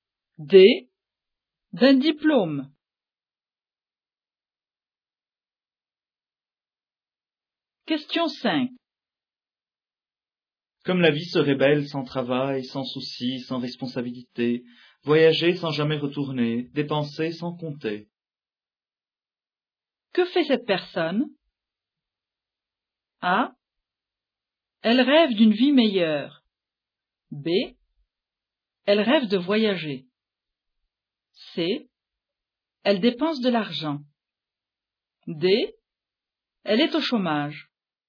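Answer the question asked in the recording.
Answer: A: Elle rêve d'une vie meilleure.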